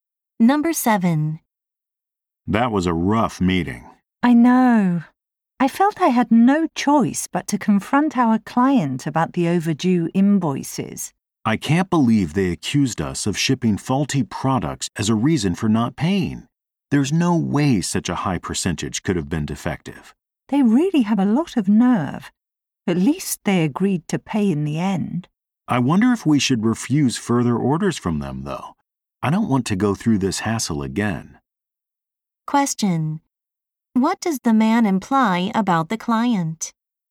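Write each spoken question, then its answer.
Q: What does the man imply about the client?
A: It made an excuse for not paying, so they may stop taking its orders.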